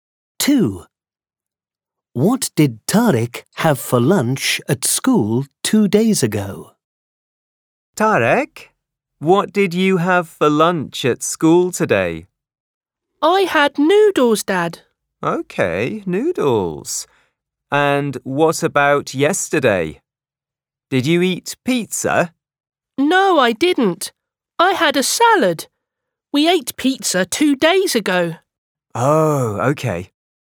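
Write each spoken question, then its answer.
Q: What did Tariq have for lunch at school 2 days ago?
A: pizza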